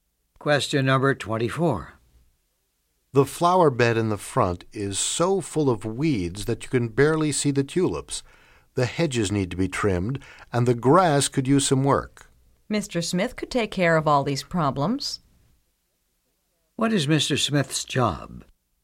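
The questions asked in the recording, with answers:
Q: What is Mr. Smith's job?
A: Gardener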